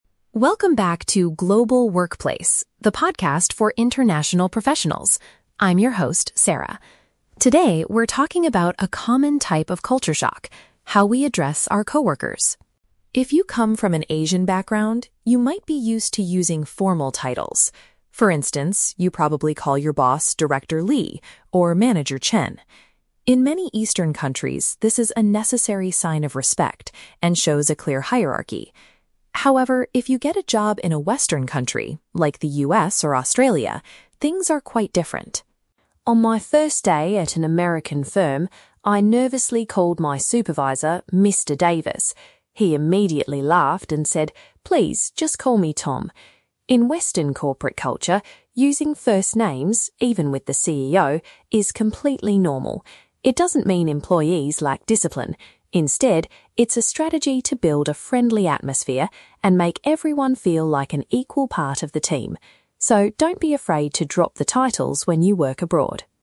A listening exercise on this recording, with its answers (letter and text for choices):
Listen to the podcast episode about workplace culture and choose the correct answer (A, B, or C).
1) What is the main difference between Eastern and Western workplaces discussed in the podcast?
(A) The way staff members speak to their managers.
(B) The number of international professionals they hire.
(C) The amount of time employees spend working in teams.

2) According to the host, why do people in Asian companies usually use formal titles?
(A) To make the office environment feel friendlier and more relaxed.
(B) To demonstrate politeness and acknowledge someone's higher position.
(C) Because it is a strict rule written in most business contracts.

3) How did the supervisor react when Sarah used his last name on her first day?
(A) He was offended because she did not use his official job title.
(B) He introduced her to the CEO to learn about company rules.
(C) He found it amusing and asked her to use his given name instead.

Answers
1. (A) The way staff members speak to their managers.
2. (B) To demonstrate politeness and acknowledge someone's higher position.
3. (C) He found it amusing and asked her to use his given name instead.

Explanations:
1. The podcast focuses on "how we address our coworkers" and bosses (using titles vs. first names). Option A paraphrases this as "the way staff members speak to their managers." Why the trap is wrong: Option (B) is a trap. The host mentions "international professionals" in her introduction, but that is the audience of the podcast, not the main difference discussed. Option (C) is a plausible workplace topic but is not the main idea of this episode.
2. Sarah explains that in Eastern countries, using titles is a "sign of respect" (demonstrate politeness) and shows a "clear hierarchy" (acknowledge someone's higher position). Why the trap is wrong: Option (A) is a trap. Making the workplace "friendly" and making everyone feel "equal" is the reason Western companies use first names, not why Asian companies use titles. Option (C) is a plausible corporate requirement but is never mentioned.
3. Sarah says her supervisor "laughed" (found it amusing) and said "just call me Tom" (asked her to use his given name). Why the trap is wrong: Option (A) is a trap. He wasn't offended; he laughed. Also, she did use a formal address ("Mr. Davis"), which is why he corrected her. Option (B) is a trap because the word "CEO" is mentioned right after this story, but the supervisor did not introduce her to the CEO.

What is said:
Sarah: Welcome back to 'Global Workplace,' the podcast for international professionals. I'm your host, Sarah. Today, we're talking about a common type of culture shock: how we address our coworkers.
If you come from an Asian background, you might be used to using formal titles. For instance, you probably call your boss 'Director Lee' or 'Manager Chen.' In many Eastern countries, this is a necessary sign of respect and shows a clear hierarchy. However, if you get a job in a Western country, like the US or Australia, things are quite different.
On my first day at an American firm, I nervously called my supervisor 'Mr. Davis.' He immediately laughed and said, 'Please, just call me Tom.' In Western corporate culture, using first names—even with the CEO—is completely normal. It doesn't mean employees lack discipline. Instead, it's a strategy to build a friendly atmosphere and make everyone feel like an equal part of the team. So, don't be afraid to drop the titles when you work abroad!